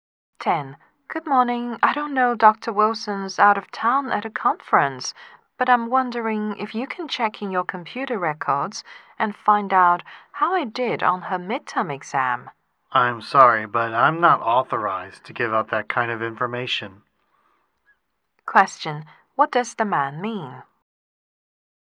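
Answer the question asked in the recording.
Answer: He is not allowed to give out exam results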